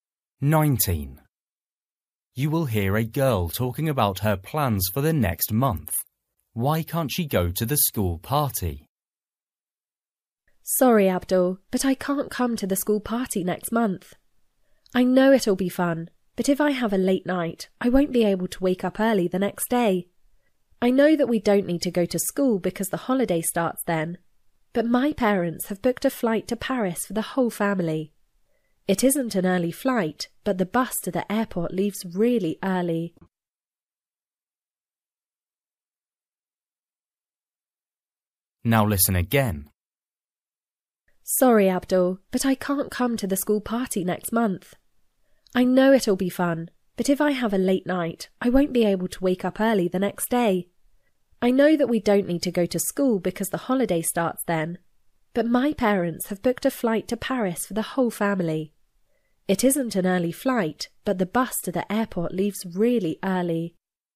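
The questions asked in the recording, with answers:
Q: Why can't she go to the school party?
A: She has to get up early to catch the bus to the airport for a family trip to Paris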